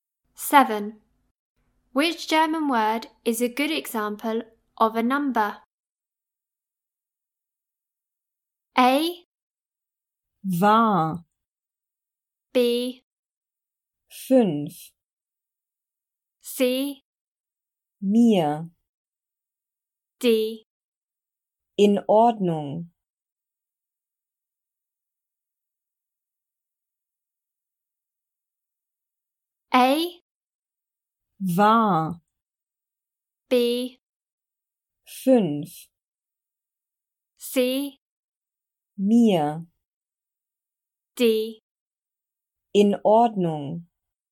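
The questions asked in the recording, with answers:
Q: Which German word is a good example of a number?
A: B: Fünf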